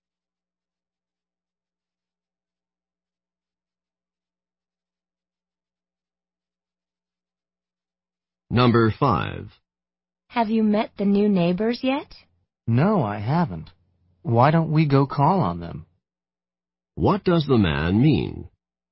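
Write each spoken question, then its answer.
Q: What does the man mean?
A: They should go and visit the new neighbors.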